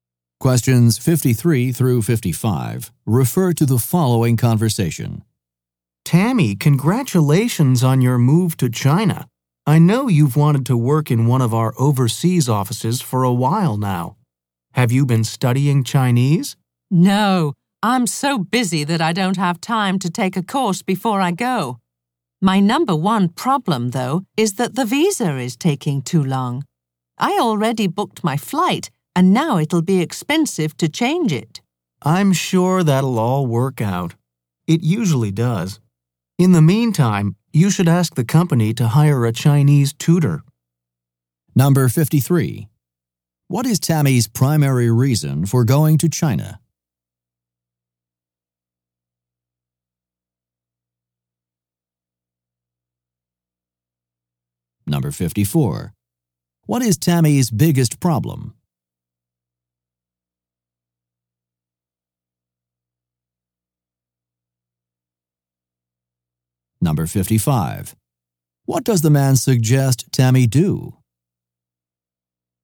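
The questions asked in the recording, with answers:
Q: What is Tammy's primary reason for going to China?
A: To work in her company's overseas office

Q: What is Tammy's biggest problem?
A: Her visa is taking too long

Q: What does the man suggest Tammy do?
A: Ask the company to hire a Chinese tutor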